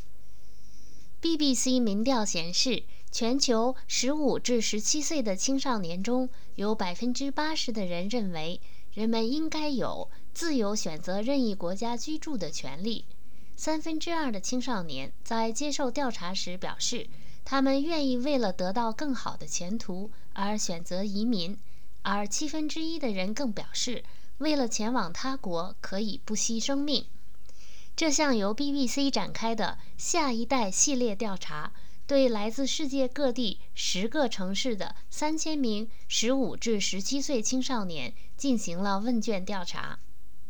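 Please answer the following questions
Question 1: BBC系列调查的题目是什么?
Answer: 下一代

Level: 3rd Year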